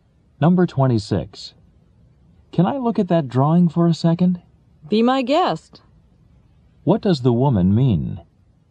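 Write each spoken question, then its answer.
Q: What does the woman mean?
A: He may look at the drawing.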